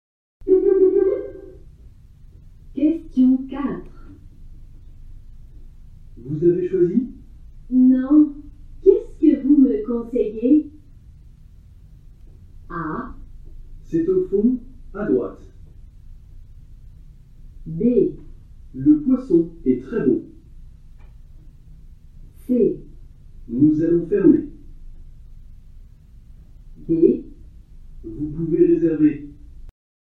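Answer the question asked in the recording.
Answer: B: Le poisson est très beau.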